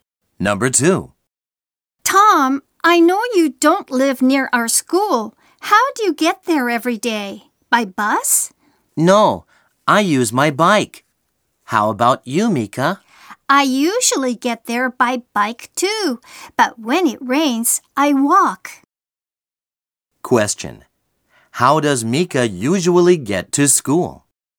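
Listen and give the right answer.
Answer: By bike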